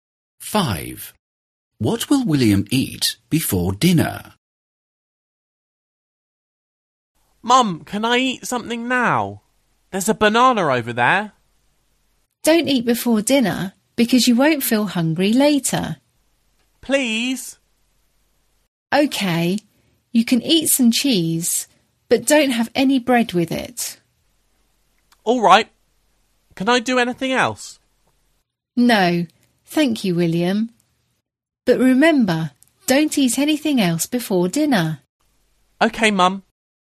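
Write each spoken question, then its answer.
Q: What will William eat before dinner?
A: cheese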